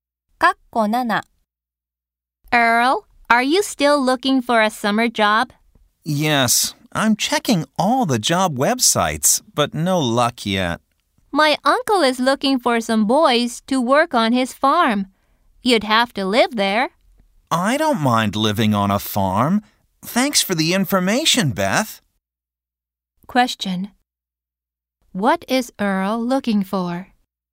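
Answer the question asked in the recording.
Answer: A summer job.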